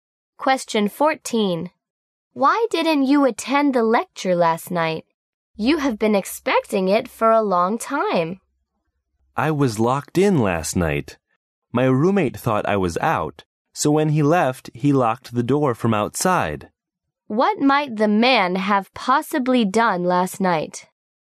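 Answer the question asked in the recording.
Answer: He stayed locked in his room and missed the lecture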